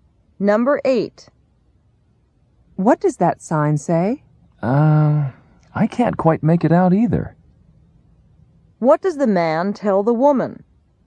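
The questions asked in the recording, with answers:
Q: What does the man tell the woman?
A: He can't read the sign either.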